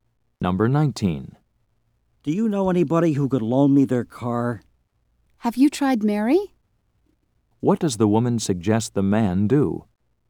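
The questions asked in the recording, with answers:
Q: What does the woman suggest the man do?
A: Ask Mary to lend him her car.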